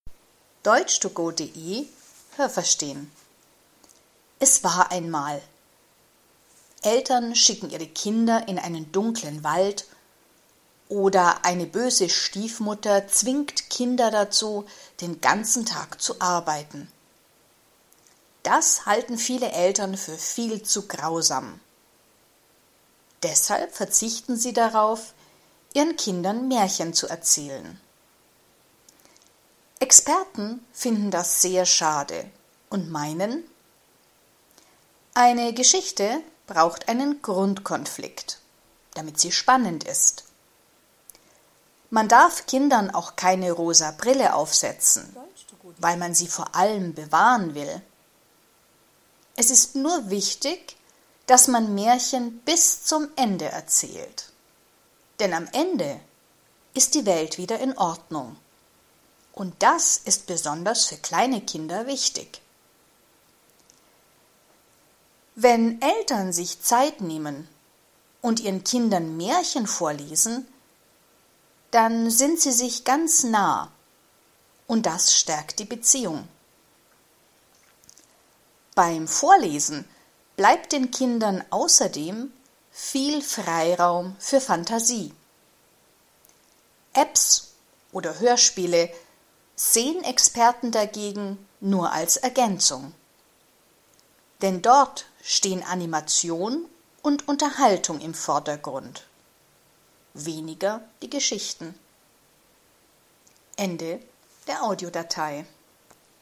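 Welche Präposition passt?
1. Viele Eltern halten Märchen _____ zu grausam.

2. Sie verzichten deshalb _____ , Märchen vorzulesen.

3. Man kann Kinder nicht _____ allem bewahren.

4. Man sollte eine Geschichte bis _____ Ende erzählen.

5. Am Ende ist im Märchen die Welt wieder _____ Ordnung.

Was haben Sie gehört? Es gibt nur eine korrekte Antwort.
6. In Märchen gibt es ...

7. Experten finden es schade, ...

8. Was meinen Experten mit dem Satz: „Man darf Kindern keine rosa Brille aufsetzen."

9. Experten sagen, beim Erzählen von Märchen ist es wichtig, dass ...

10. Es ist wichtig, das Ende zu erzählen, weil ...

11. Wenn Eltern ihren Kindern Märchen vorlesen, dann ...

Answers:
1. für
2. darauf
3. vor
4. zum
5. in
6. grausame Dinge, z. B. Eltern schicken Kinder in einen dunklen Wald
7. dass Eltern darauf verzichten, ihren Kindern Märchen zu erzählen
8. Man kann Kinder nicht vor allem bewahren.
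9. man Märchen bis zum Ende erzählt
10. am Ende die Welt wieder in Ordnung ist
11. sind sie sich ganz nah und das stärkt die Beziehung

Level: B (mittel)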